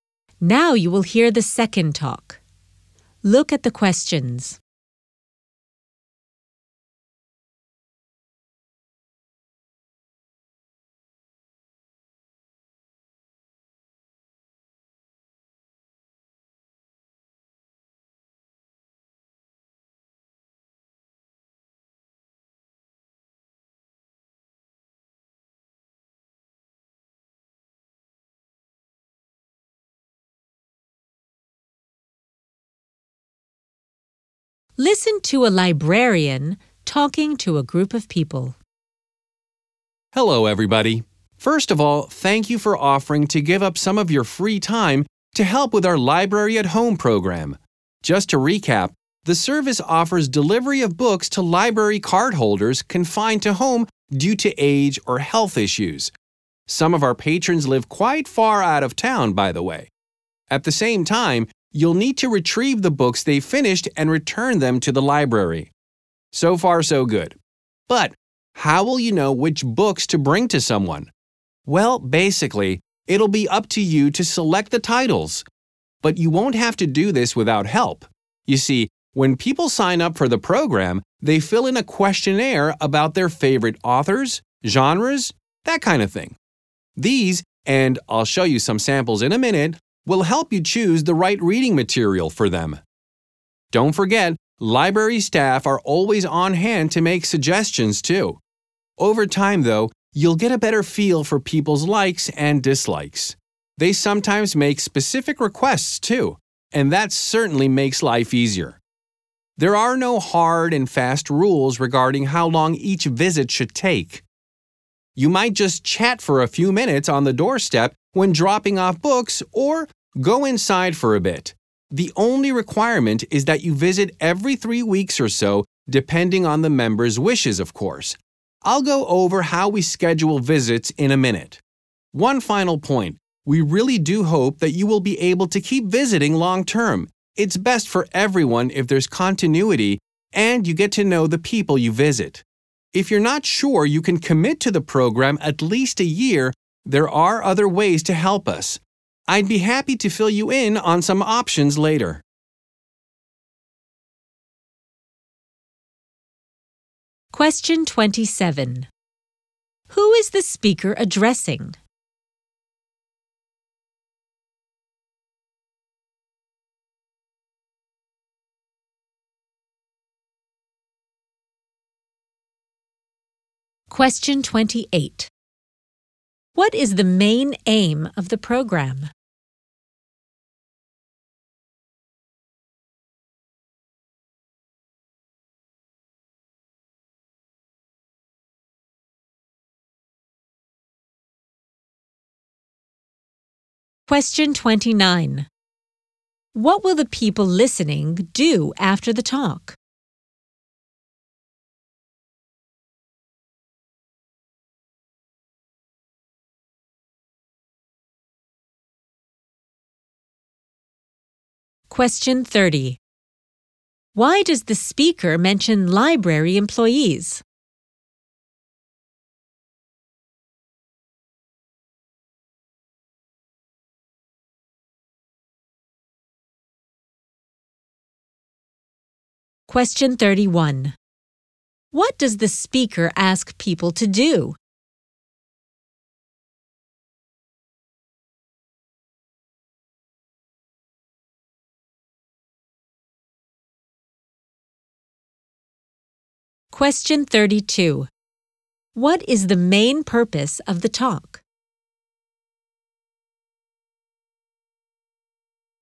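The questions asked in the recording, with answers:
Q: Who is the speaker addressing?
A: Volunteers for the Library at Home program

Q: What is the main aim of the program?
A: To deliver books to cardholders confined to home

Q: Why does the speaker mention library employees?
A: They can help suggest books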